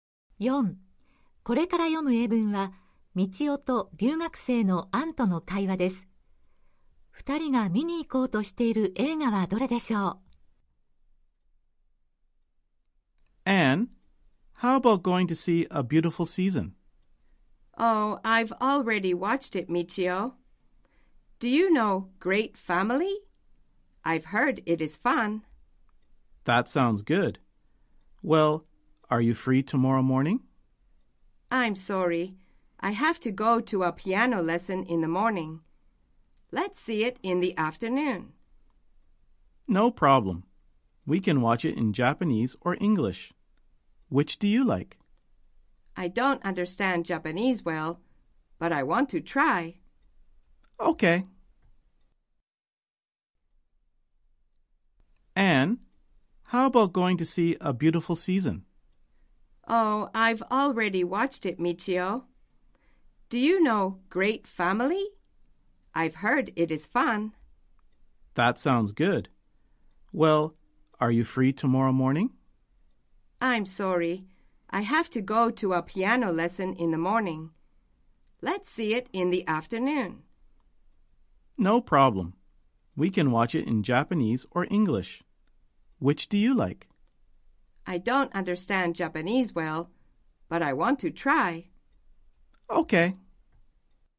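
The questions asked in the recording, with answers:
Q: 二人が見に行こうとしている映画はどれでしょう。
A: Great Family(明日の午後、日本語版)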